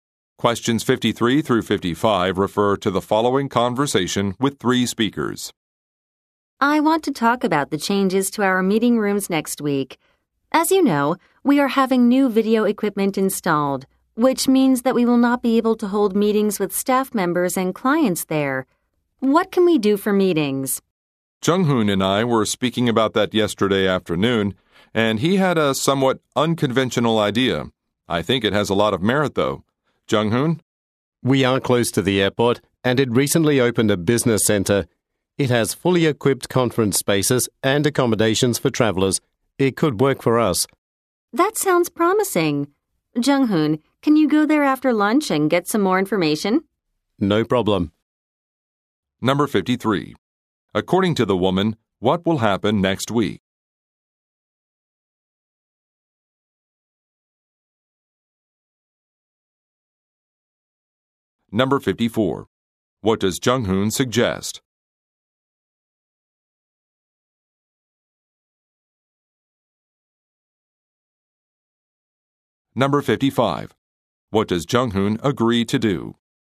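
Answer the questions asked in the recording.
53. New video equipment will be installed in the meeting rooms
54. Using the airport business center for meetings
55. Go to the business center after lunch to get more information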